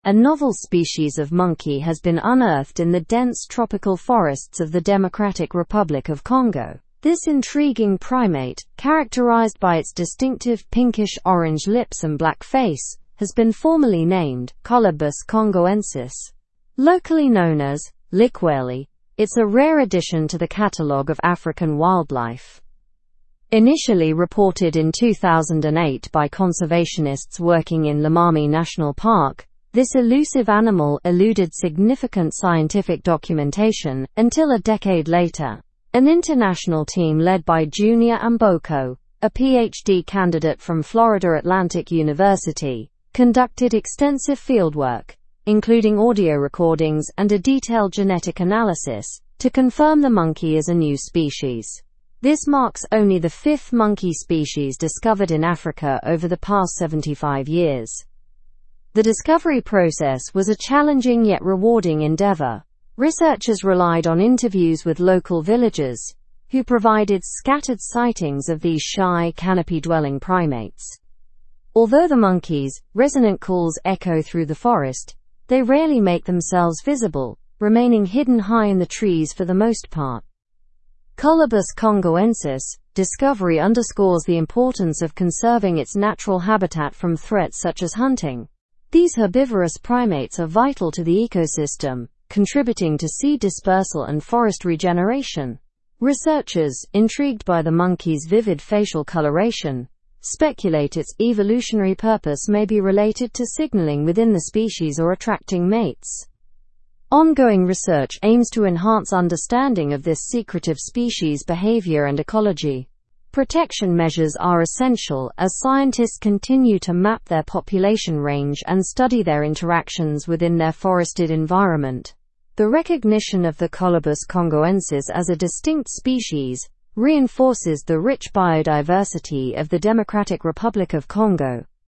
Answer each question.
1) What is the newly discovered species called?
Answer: Colobus congoensis.

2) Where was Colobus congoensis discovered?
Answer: In the Democratic Republic of Congo.

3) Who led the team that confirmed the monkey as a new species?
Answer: Junior Amboko led the team.

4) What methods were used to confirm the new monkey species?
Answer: Extensive fieldwork, audio recordings, and genetic analysis were used.

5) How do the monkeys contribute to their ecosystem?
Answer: Through seed dispersal and forest regeneration.

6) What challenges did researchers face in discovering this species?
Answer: Monkeys are elusive and remain mostly in the canopy, making observations difficult.

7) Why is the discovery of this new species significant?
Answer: It highlights the rich biodiversity of the Democratic Republic of Congo and the need for habitat conservation.

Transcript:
A novel species of monkey has been unearthed in the dense tropical forests of the Democratic Republic of Congo. This intriguing primate, characterized by its distinctive pinkish-orange lips and black face, has been formally named 'Colobus congoensis'. Locally known as 'Likweli', it's a rare addition to the catalog of African wildlife.
Initially reported in 2008 by conservationists working in Lomami National Park, this elusive animal eluded significant scientific documentation until a decade later. An international team led by Junior Amboko, a PhD candidate from Florida Atlantic University, conducted extensive fieldwork, including audio recordings and a detailed genetic analysis, to confirm the monkey as a new species. This marks only the fifth monkey species discovered in Africa over the past 75 years.
The discovery process was a challenging yet rewarding endeavor. Researchers relied on interviews with local villagers who provided scattered sightings of these shy, canopy-dwelling primates. Although the monkeys' resonant calls echo through the forest, they rarely make themselves visible, remaining hidden high in the trees for the most part.
Colobus congoensis' discovery underscores the importance of conserving its natural habitat from threats such as hunting. These herbivorous primates are vital to the ecosystem, contributing to seed dispersal and forest regeneration. Researchers, intrigued by the monkey's vivid facial coloration, speculate its evolutionary purpose may be related to signaling within the species or attracting mates.
Ongoing research aims to enhance understanding of this secretive species' behavior and ecology. Protection measures are essential as scientists continue to map their population range and study their interactions within their forested environment.
are essential as scientists continue to map their population range and study their interactions within their forested environment. The recognition of the Colobus congoensis as a distinct species reinforces the rich biodiversity of the Democratic Republic of Congo.

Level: Level 4